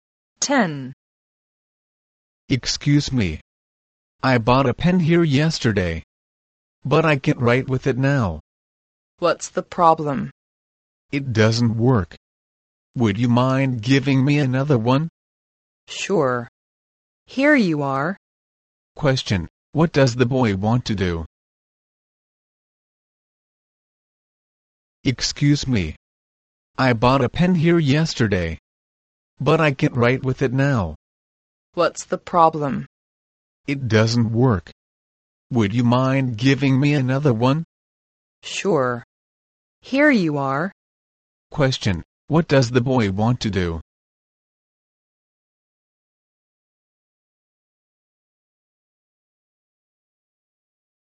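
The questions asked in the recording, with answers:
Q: What does the boy want to do?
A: Change his pen for another one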